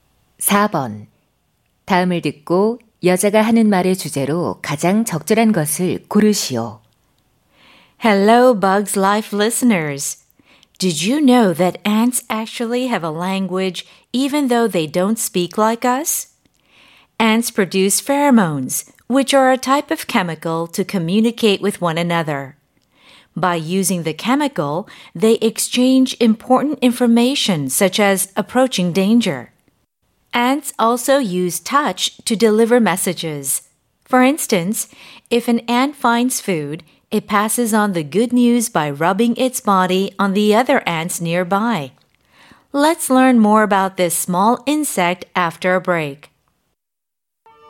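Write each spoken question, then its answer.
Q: 다음을 듣고 여자가 하는 말의 주제로 가장 적절한 것을 고르시오.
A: 개미의 의사소통 방법(페로몬과 촉각)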